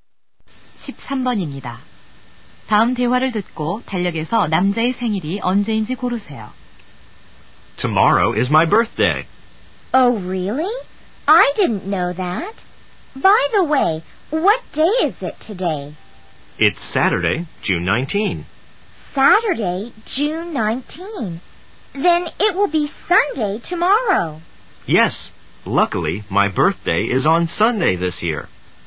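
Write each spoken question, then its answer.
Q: 다음 대화를 듣고 달력에서 남자의 생일이 언제인지 고르세요.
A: 6월 20일 일요일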